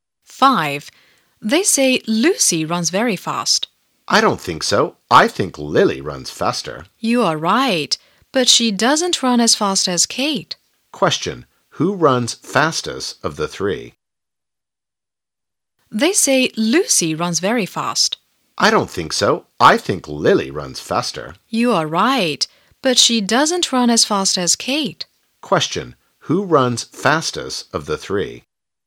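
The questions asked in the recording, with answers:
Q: Who runs fastest of the three?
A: Kate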